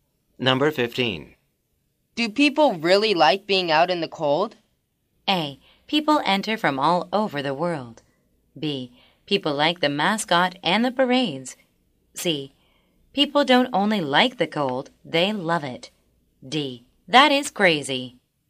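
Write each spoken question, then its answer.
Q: Do people really like being out in the cold?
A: C: People don't only like the cold, they love it.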